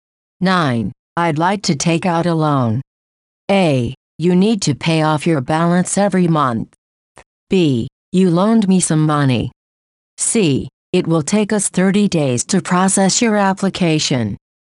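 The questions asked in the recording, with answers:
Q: I'd like to take out a loan.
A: C: It will take us 30 days to process your application.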